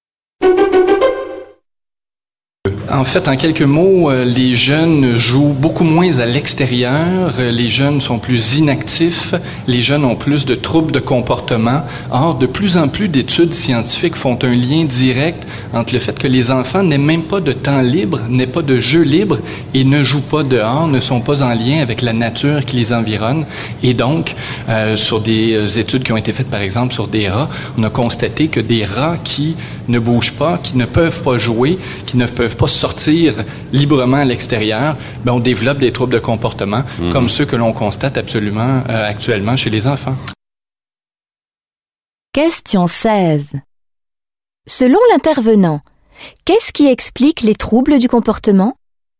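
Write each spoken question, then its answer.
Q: Selon l'intervenant, qu'est-ce qui explique les troubles du comportement?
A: Le manque de jeu libre dehors et de contact avec la nature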